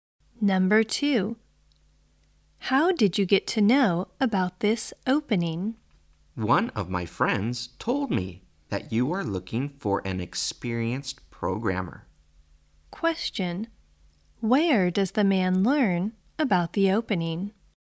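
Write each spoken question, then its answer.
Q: Where does the man learn about the opening?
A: From one of his friends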